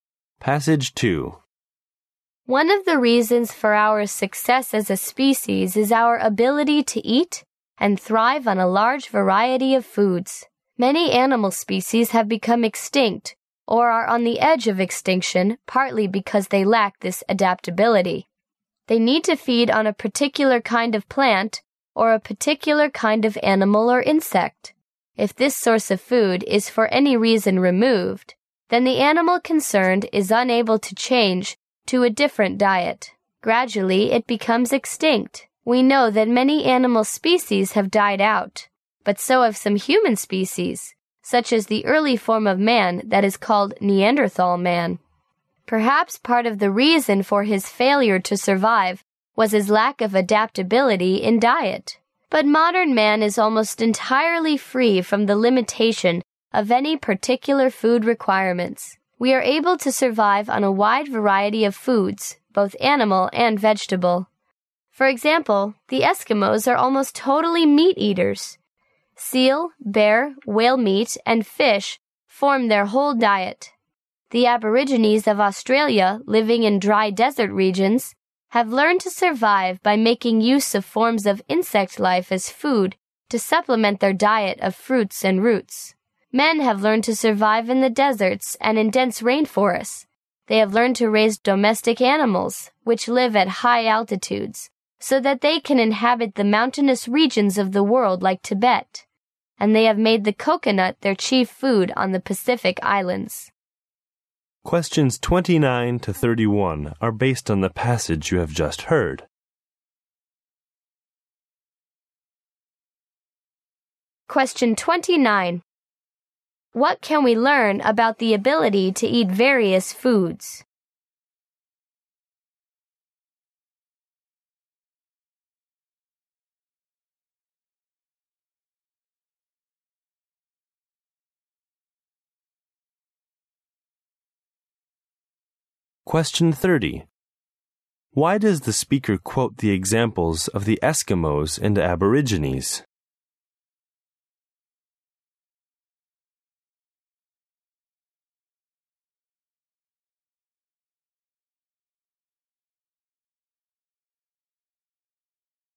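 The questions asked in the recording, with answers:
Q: What can we learn about the ability to eat various foods?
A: It is one reason for humans' success as a species

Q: Why does the speaker quote the examples of the Eskimos and Aborigines?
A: To show that humans can adapt to very different diets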